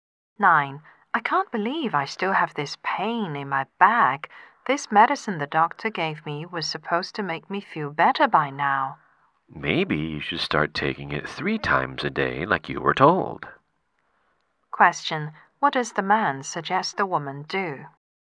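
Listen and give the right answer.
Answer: Take the medicine three times a day as told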